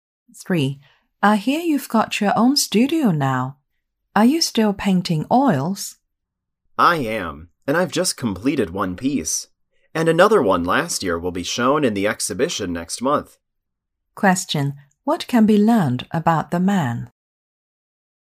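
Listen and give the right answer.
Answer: He still paints oils and one of his paintings will be shown in next month's exhibition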